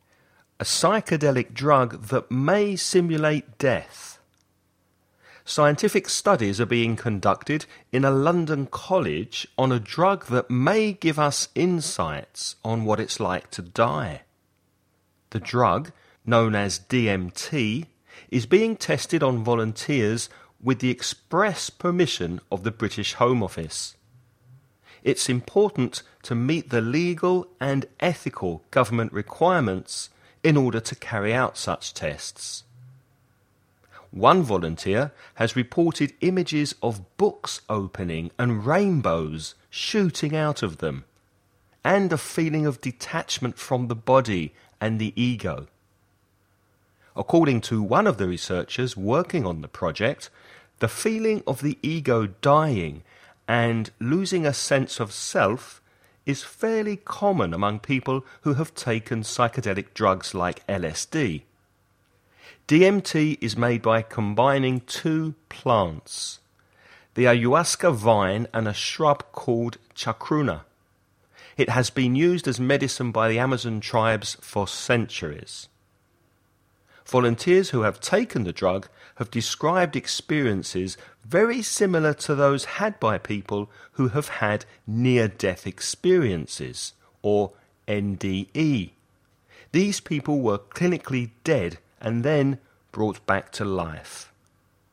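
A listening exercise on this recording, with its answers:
You're going to listen to a man speaking about about recent clinical tests of a psychedelic drug. Before you listen, read the following questions.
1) In which city are the drug trials taking place?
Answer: London

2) What's the drug called?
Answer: DMT

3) According to one volunteer, what did they see coming out of open books?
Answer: Rainbows

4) Two types of what are combined together to produce the drug?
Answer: Plants

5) What does NDE stand for?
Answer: Near-death experience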